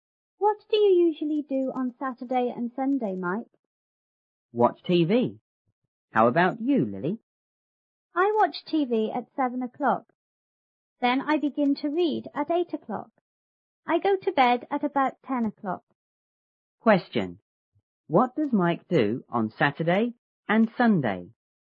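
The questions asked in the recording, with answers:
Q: What does Mike do on Saturday and Sunday?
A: Watch TV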